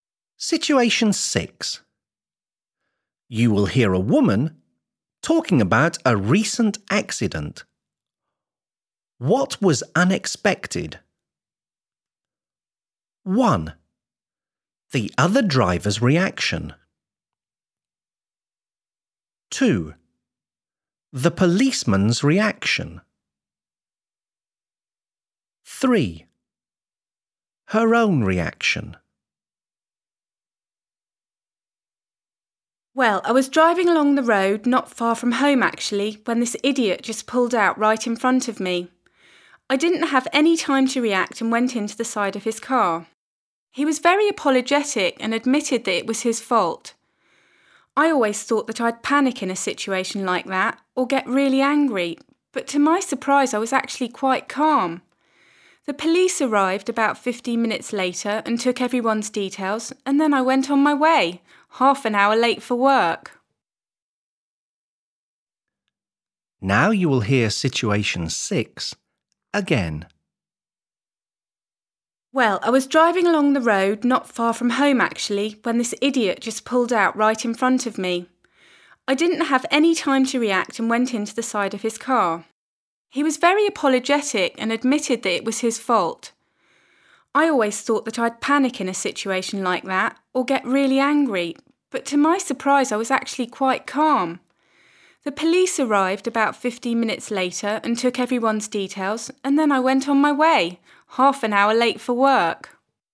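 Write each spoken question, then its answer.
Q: What was unexpected?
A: 3: her own reaction.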